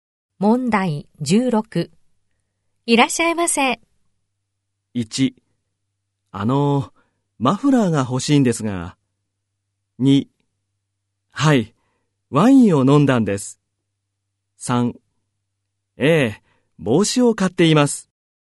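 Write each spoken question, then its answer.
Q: いらっしゃいませ。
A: 1: マフラーが欲しいんですが。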